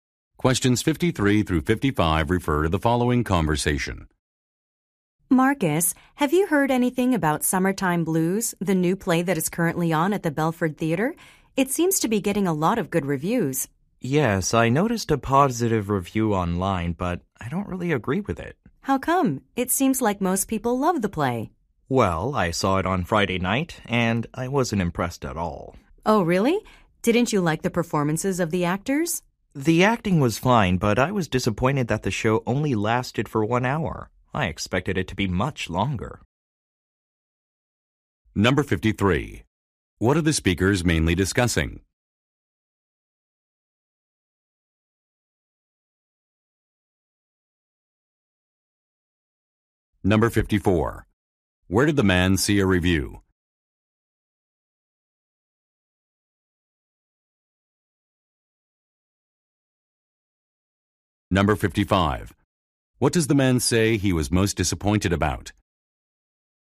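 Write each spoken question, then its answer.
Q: What are the speakers mainly discussing?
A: A new play

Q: Where did the man see a review?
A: Online

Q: What does the man say he was most disappointed about?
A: The show only lasted 1 hour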